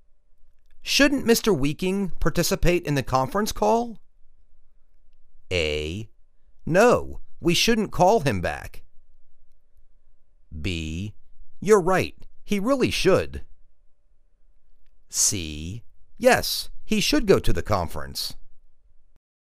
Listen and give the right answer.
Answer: You're right. He really should.